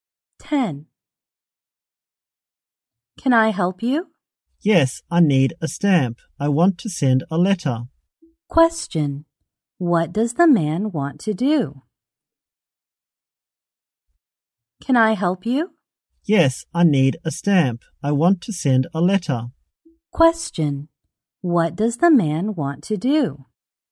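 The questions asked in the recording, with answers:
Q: What does the man want to do?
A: Send a letter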